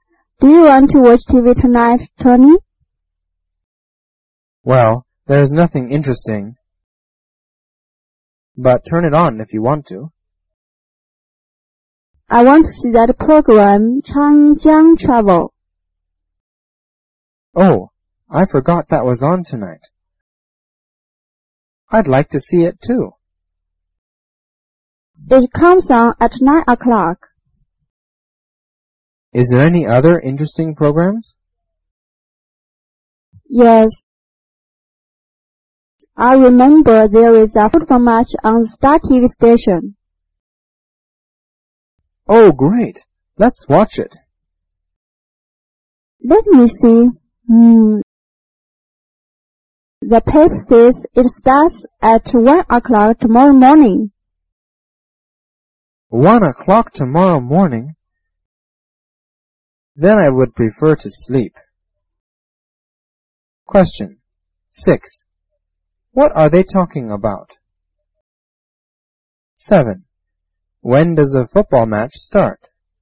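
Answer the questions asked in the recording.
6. TV programs
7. At 1 o'clock tomorrow morning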